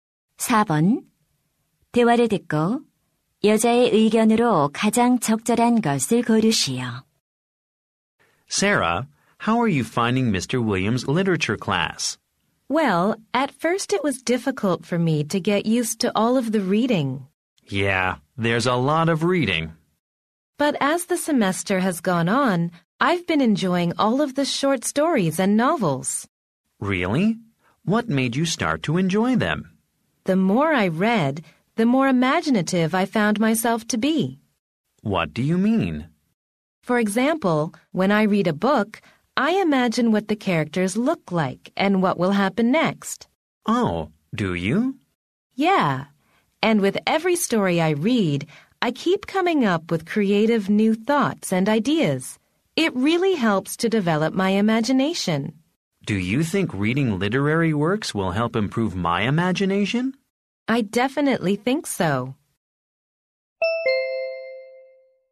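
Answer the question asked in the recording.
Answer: 문학 작품을 읽으면 상상력이 길러진다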